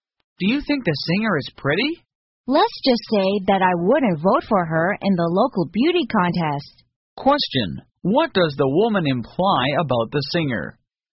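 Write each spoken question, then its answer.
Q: what does the woman imply about the singer?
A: She doesn't think the singer is pretty.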